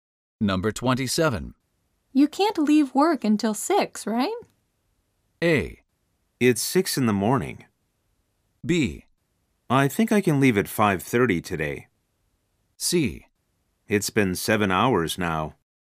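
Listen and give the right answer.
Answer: B: I think I can leave at 5:30 today.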